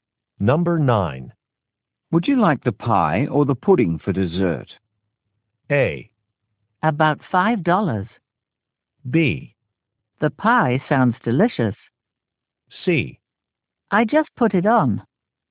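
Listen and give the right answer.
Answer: B: The pie sounds delicious.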